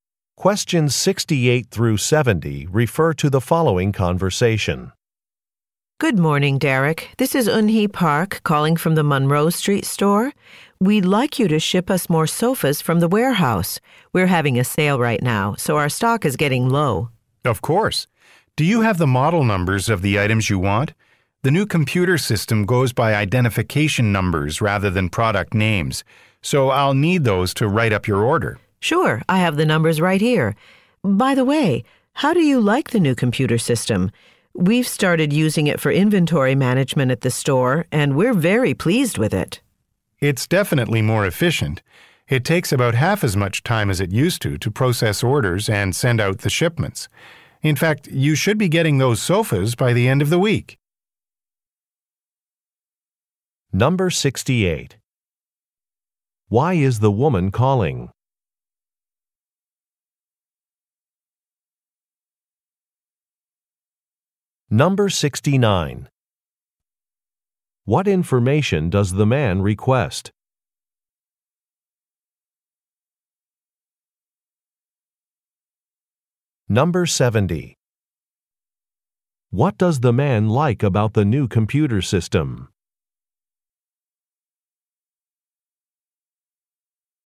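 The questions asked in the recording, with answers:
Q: Why is the woman calling?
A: To order more sofas from the warehouse

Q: What information does the man request?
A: The model numbers

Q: What does the man like about the new computer system?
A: It processes orders in about half the time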